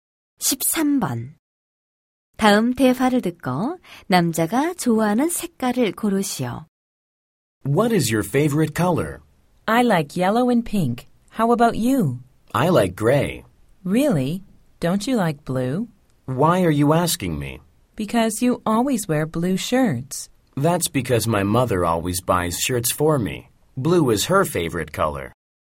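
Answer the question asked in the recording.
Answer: 회색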